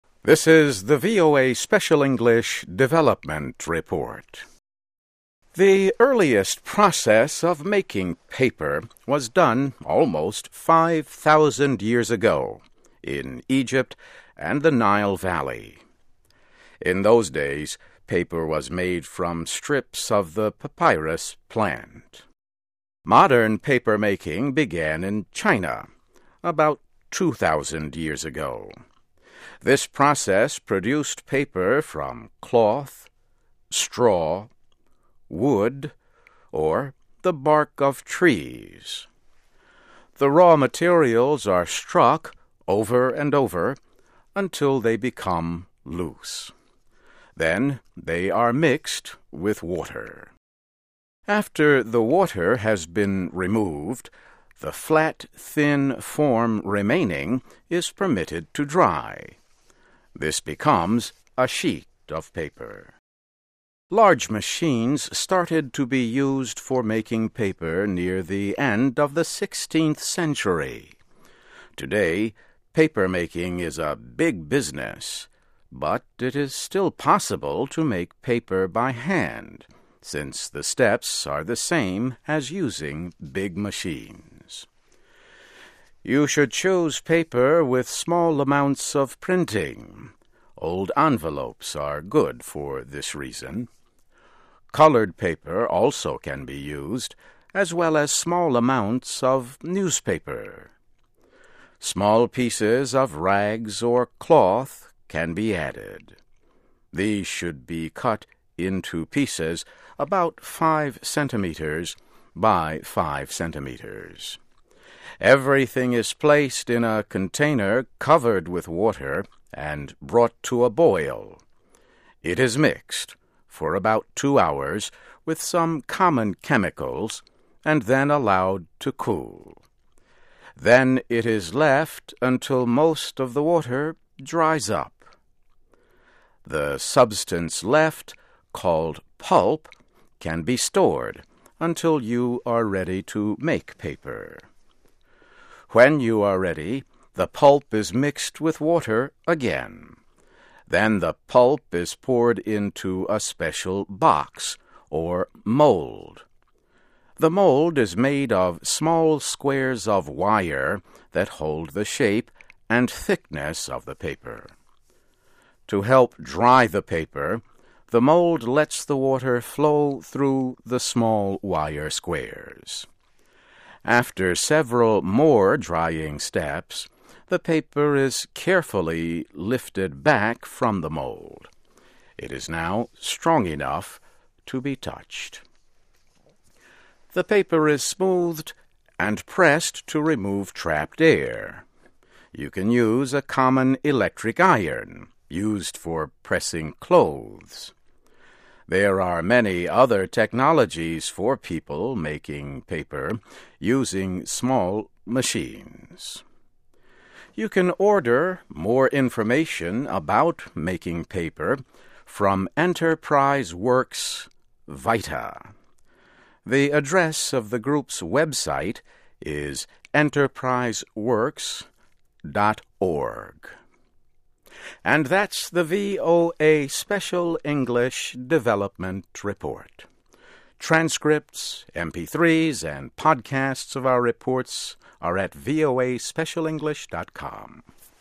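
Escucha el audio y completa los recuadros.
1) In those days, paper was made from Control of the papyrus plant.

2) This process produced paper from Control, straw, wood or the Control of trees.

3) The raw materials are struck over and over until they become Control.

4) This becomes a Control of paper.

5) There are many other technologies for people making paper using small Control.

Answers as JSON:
{"1": "strips", "2": "cloth; bark", "3": "loose", "4": "sheet", "5": "machines"}

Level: Nivel Intermedio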